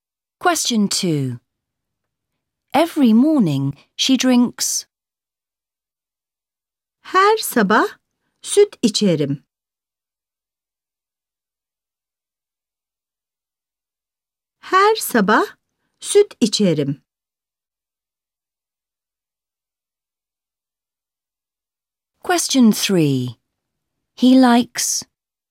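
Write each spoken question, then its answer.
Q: Every morning she drinks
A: milk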